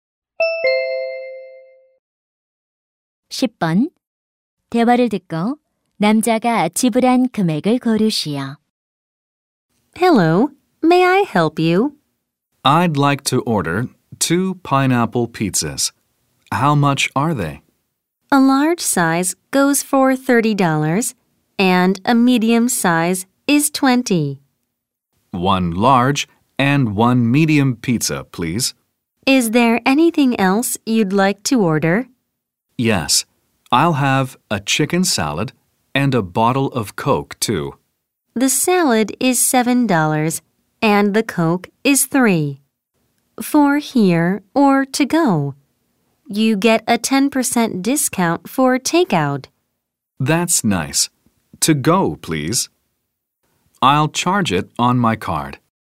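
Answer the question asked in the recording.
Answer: $54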